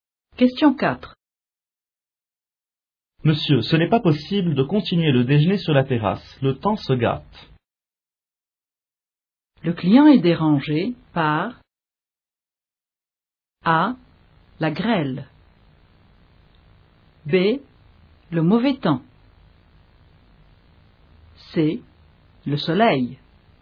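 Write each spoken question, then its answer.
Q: Le client est dérangé par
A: B: Le mauvais temps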